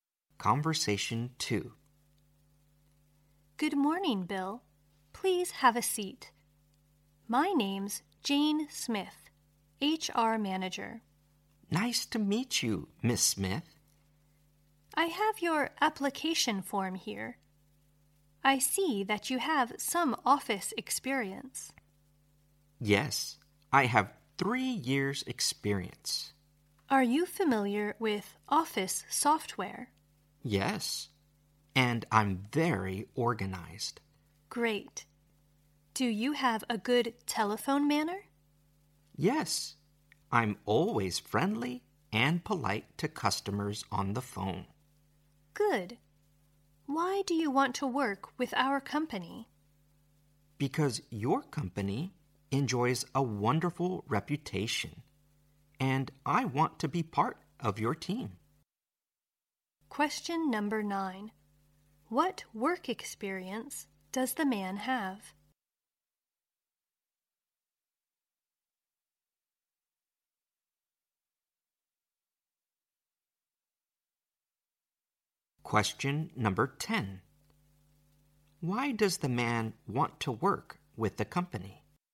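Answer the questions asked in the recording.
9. 3 years' office experience
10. The company has a wonderful reputation and he wants to be part of the team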